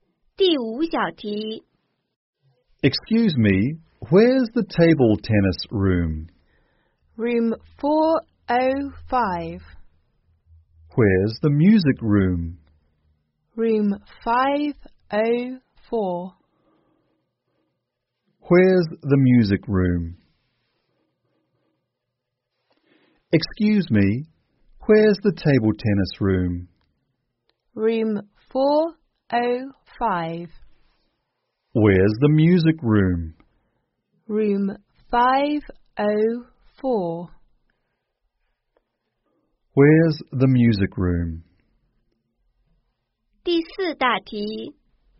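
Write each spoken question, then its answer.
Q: Where's the music room?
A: Room 504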